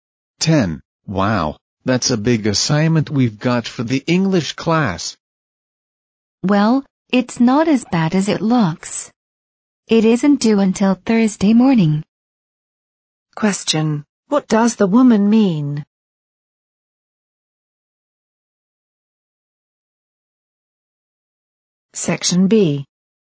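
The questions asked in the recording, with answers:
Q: What does the woman mean?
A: The assignment isn't so bad, since it isn't due until Thursday.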